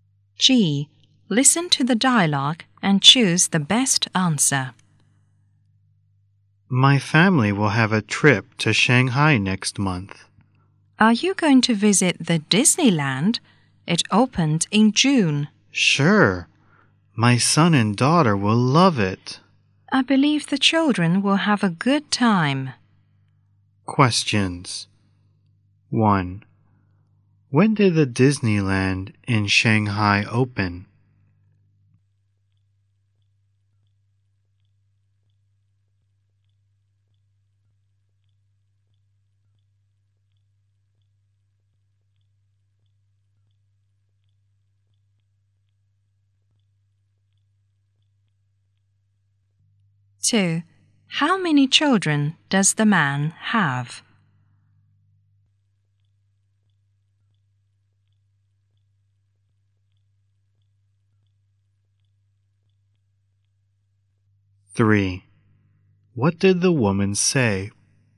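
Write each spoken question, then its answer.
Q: When did the Disneyland in Shanghai open?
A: In June.

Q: How many children does the man have?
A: Two.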